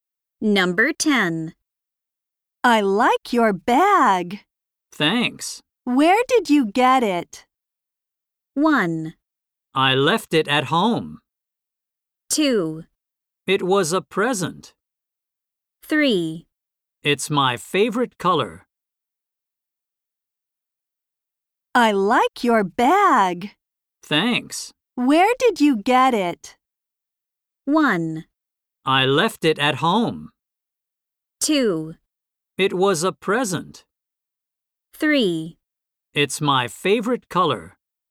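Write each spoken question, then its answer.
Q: Where did you get it?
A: 2: It was a present.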